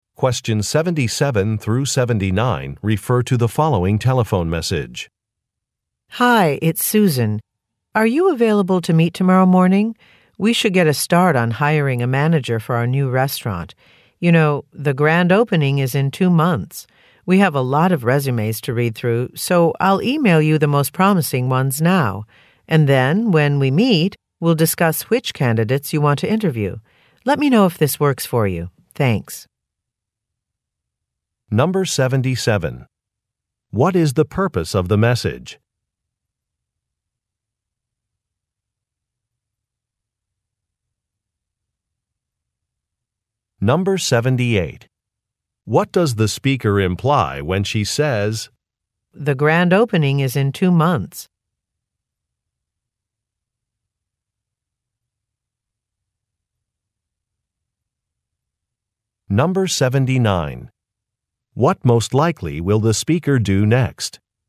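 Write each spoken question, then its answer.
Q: What is the purpose of the message?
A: To set up a meeting to start hiring a manager for the new restaurant

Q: What most likely will the speaker do next?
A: Email the most promising resumes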